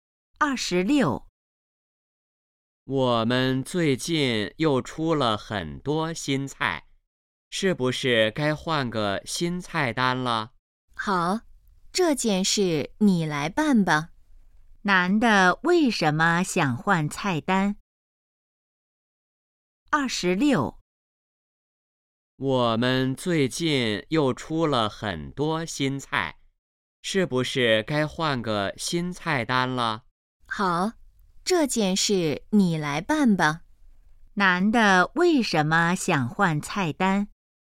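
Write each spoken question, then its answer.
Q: 男的为什么想换菜单?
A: 出了很多新菜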